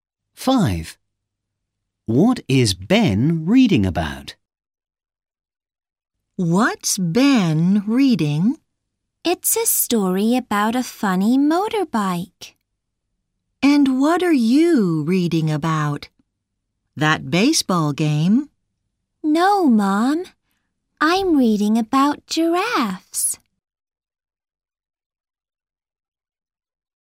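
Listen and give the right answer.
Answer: a funny motorbike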